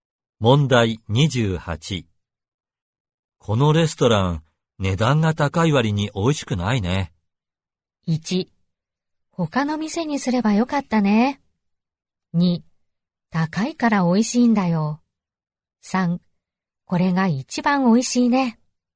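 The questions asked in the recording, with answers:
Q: このレストラン、値段が高い割に美味しくないね。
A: 1: 他の店にすればよかったね。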